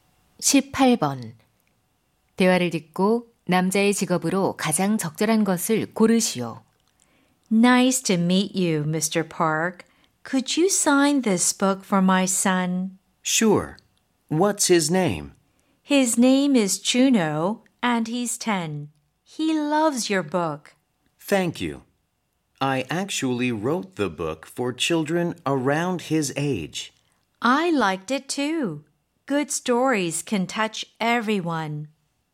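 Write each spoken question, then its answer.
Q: 대화를 듣고 남자의 직업으로 가장 적절한 것을 고르시오.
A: 작가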